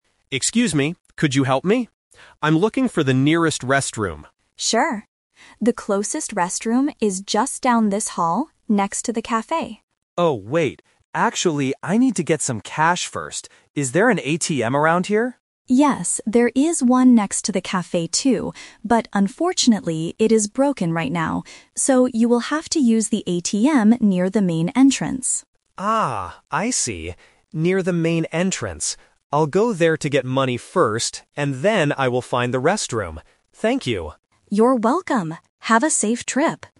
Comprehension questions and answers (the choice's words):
Listen to the conversation between a tourist and an information clerk. Choose the correct answer (A, B, or C).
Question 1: What does the tourist decide to do FIRST?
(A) Use the restroom.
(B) Buy a coffee.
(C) Get some money.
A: Get some money.

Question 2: Where is the ATM that the tourist will use?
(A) Next to the cafe.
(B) Near the main entrance.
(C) Near the ticket office.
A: Near the main entrance.

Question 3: Where is the closest restroom?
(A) Next to the cafe.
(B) Near the main entrance.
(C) On the second floor.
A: Next to the cafe.

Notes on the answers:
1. The tourist originally asks for the restroom (Option A - The Trap). However, he uses the word "Actually" to change his plan, saying, "I need to get some cash first." Getting cash means getting money. Option (B) is incorrect because the cafe is only a landmark, not what he wants.
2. This question uses "The Twist". There is an ATM "next to the cafe" (Option A - The Trap), but the clerk says "it is broken." Therefore, the tourist has to use the one "near the main entrance." Option (C) is not mentioned in the audio.
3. At the beginning of the conversation, the clerk clearly states, "The closest restroom is just down this hall, next to the cafe." Option (B) is the trap because that is where the working ATM is located. Option (C) is never mentioned.

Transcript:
Tourist: Excuse me, could you help me? I'm looking for the nearest restroom.
Information Clerk: Sure. The closest restroom is just down this hall, next to the cafe.
Tourist: Oh, wait. Actually, I need to get some cash first. Is there an ATM around here?
Information Clerk: Yes, there is one next to the cafe too. But unfortunately, it is broken right now. So, you will have to use the ATM near the main entrance.
Tourist: Ah, I see. I'll go there to get money first, and then I will find the restroom. Thank you!